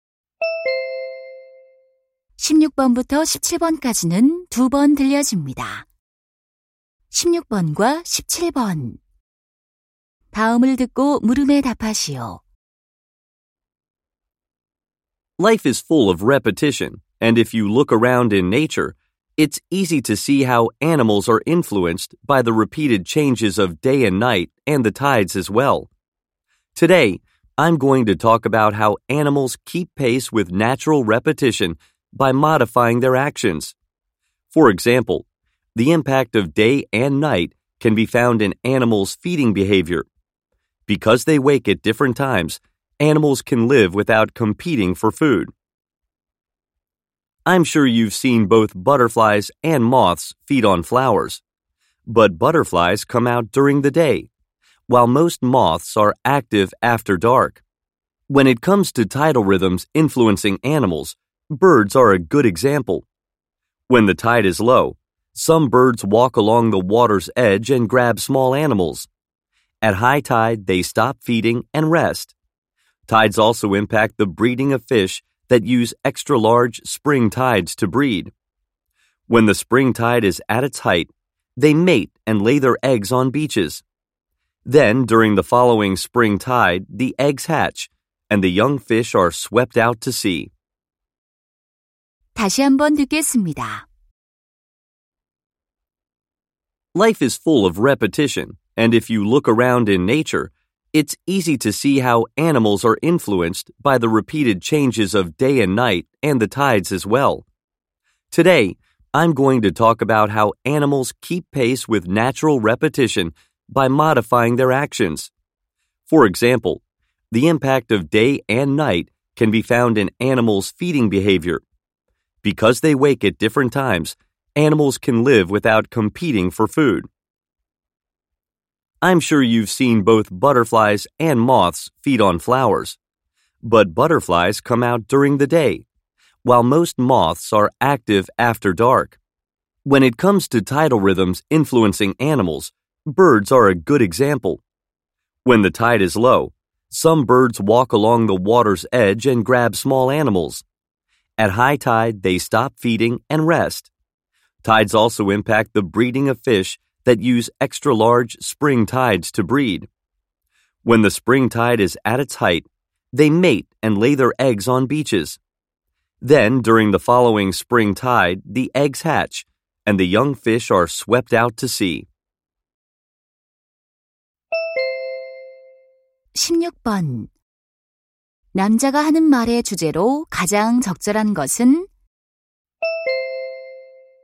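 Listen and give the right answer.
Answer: 동물들이 자연의 반복(낮과 밤, 조수)에 맞춰 행동을 조절하는 방식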